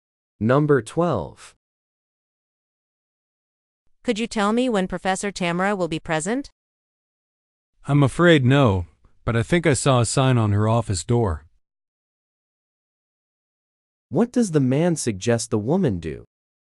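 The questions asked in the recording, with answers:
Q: What does the man suggest the woman do?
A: Check the sign on the professor's office door.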